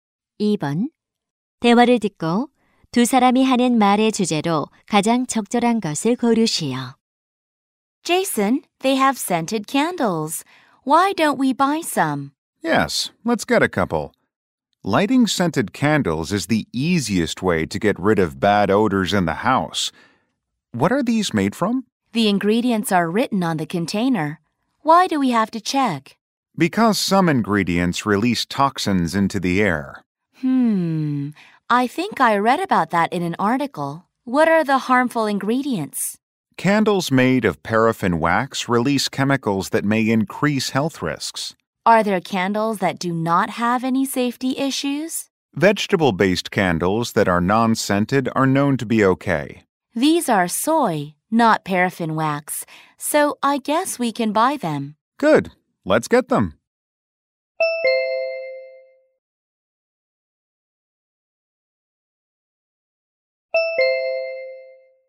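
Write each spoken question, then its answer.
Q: 대화를 듣고 두 사람이 하는 말의 주제로 가장 적절한 것을 고르시오.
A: 향초의 유해 성분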